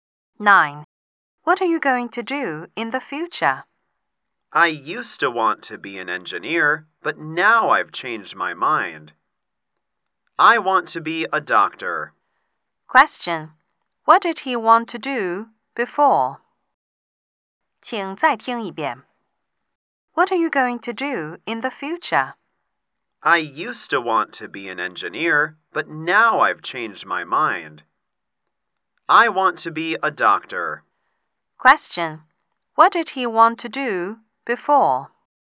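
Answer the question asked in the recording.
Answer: Be an engineer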